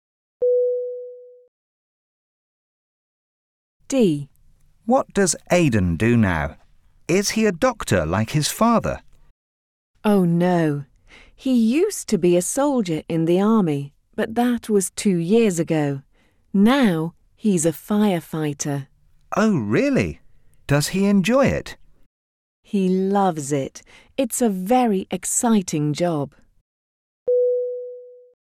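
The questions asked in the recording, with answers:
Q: What does Aidan do now?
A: He's a firefighter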